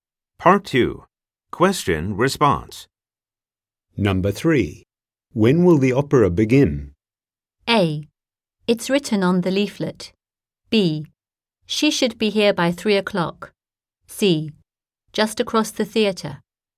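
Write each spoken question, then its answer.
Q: When will the opera begin?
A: A: It's written on the leaflet.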